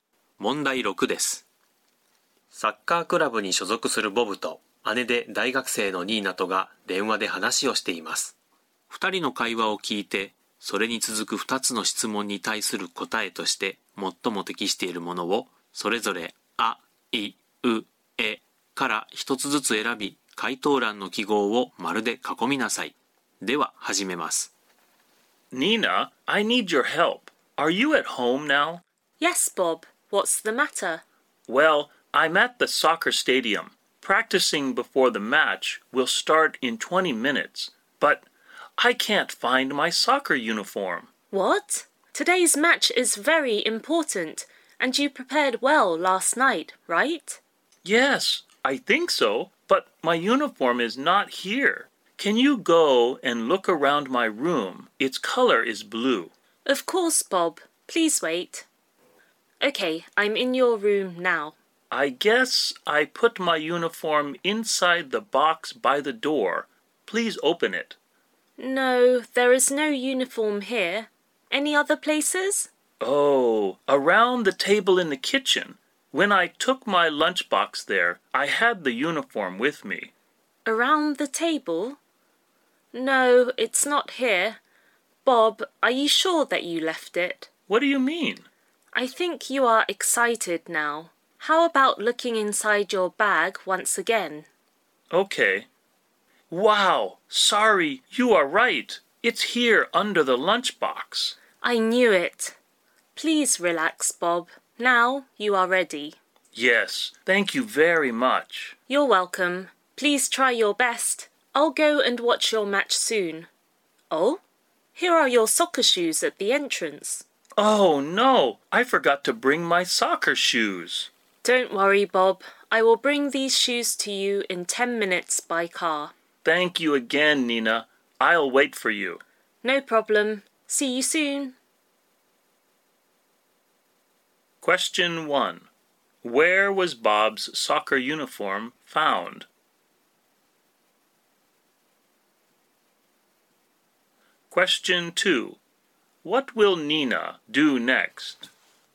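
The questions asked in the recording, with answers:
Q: Where was Bob's soccer uniform found?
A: In his bag, under the lunchbox

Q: What will Nina do next?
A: She will take his soccer shoes to him by car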